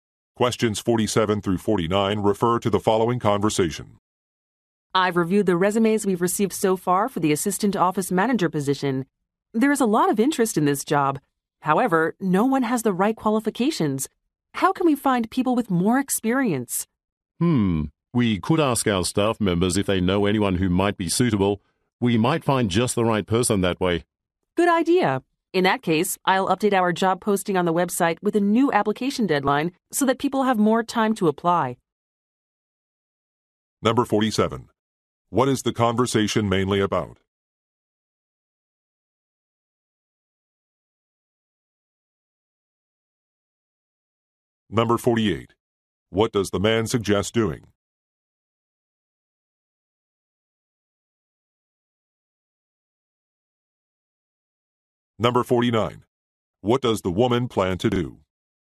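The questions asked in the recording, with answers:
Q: What is the conversation mainly about?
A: Hiring an assistant office manager

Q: What does the man suggest doing?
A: Asking staff for referrals

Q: What does the woman plan to do?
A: Extend the application deadline on the website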